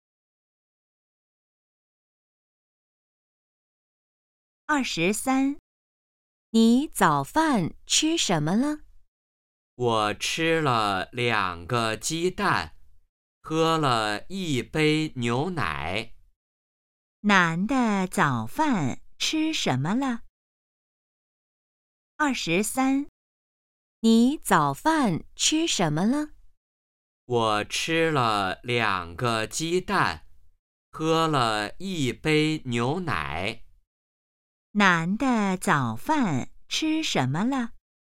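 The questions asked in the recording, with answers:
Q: 男的早饭吃什么了?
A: 两个鸡蛋和一杯牛奶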